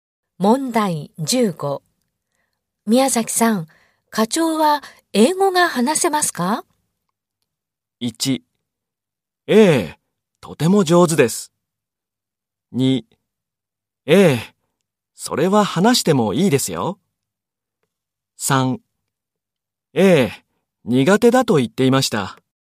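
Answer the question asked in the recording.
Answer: 1: ええ、とても上手です。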